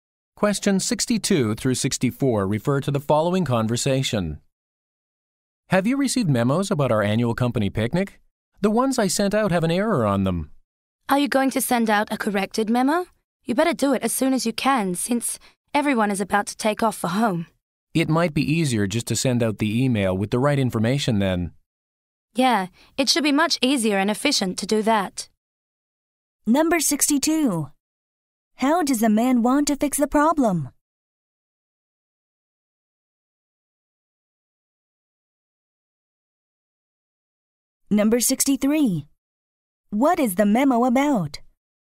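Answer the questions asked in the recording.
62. By sending an email with the correct information
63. The annual company picnic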